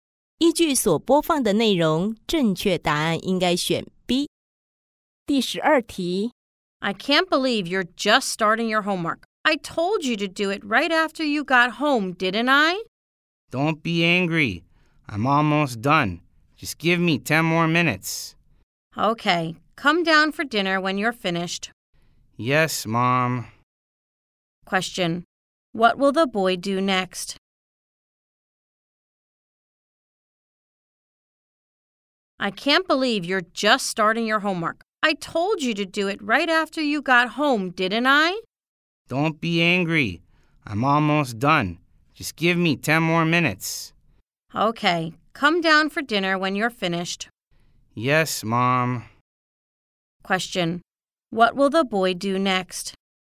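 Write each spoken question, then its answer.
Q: Question. What will the boy do next?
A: Finish his homework, then come down for dinner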